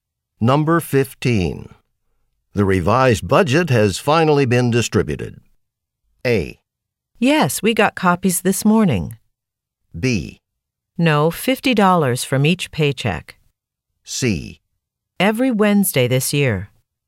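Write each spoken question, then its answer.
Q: The revised budget has finally been distributed.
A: A: Yes, we got copies this morning.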